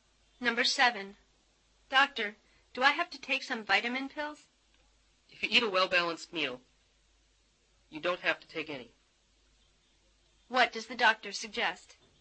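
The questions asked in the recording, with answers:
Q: What does the doctor suggest?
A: Eat well-balanced meals instead of taking vitamin pills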